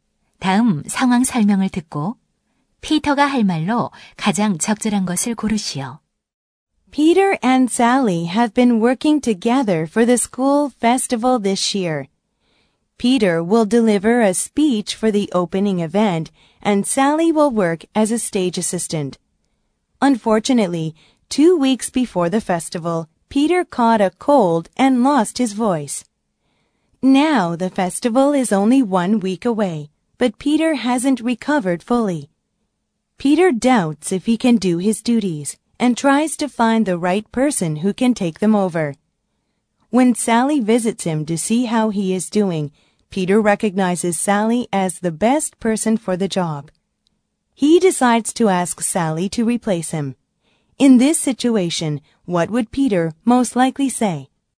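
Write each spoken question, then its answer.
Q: In this situation, what would Peter most likely say?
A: He would ask Sally to take over his job and give the opening speech for him.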